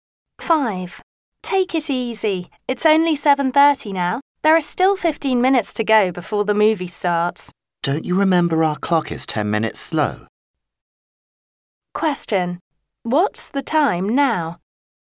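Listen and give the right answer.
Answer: 7:40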